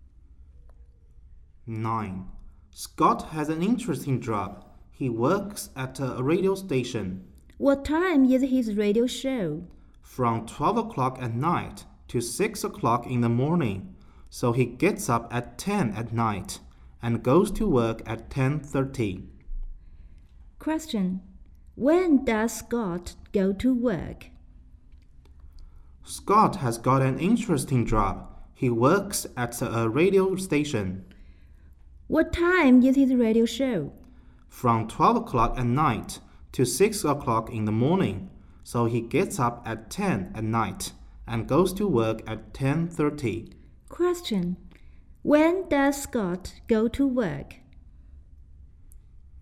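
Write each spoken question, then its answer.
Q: When does Scott go to work?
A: At 10:30 at night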